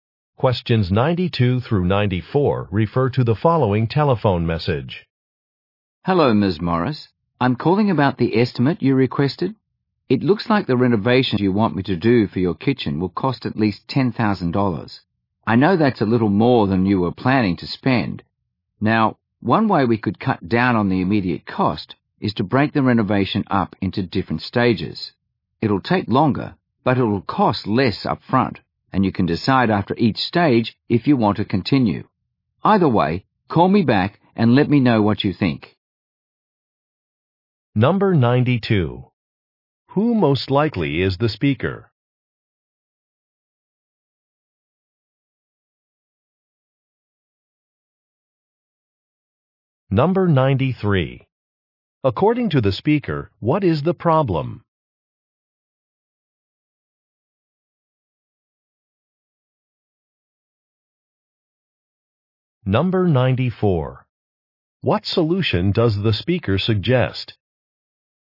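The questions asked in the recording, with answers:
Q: Who most likely is the speaker?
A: A contractor doing kitchen renovations

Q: According to the speaker, what is the problem?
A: The cost is higher than she planned

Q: What solution does the speaker suggest?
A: Doing the renovation in stages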